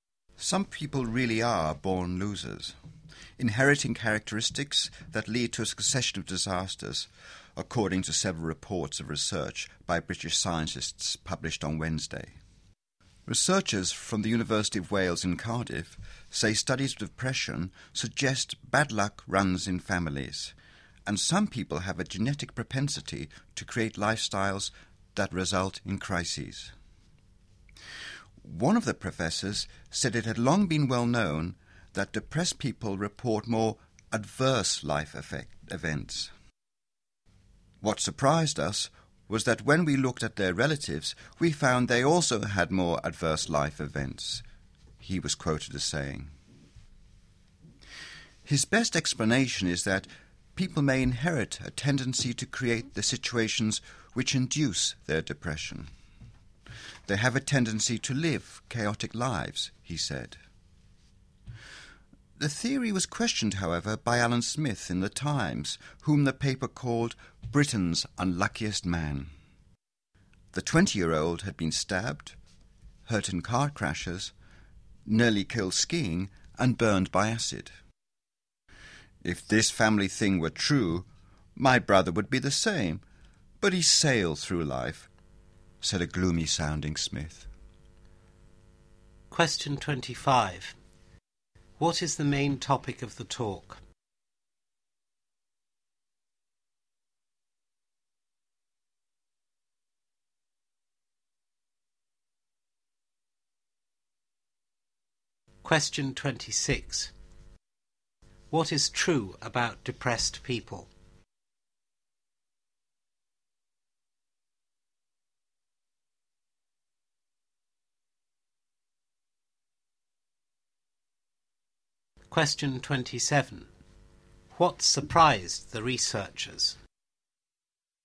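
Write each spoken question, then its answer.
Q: What is the main topic of the talk?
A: Research suggesting that bad luck runs in families and may be inherited

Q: What is true about depressed people?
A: They report more adverse life events

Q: What surprised the researchers?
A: Relatives of depressed people also had more adverse life events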